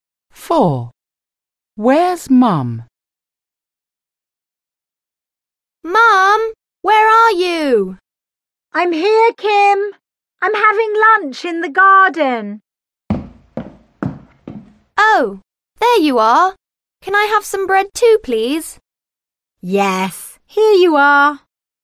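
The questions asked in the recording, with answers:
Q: Where's Mum?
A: In the garden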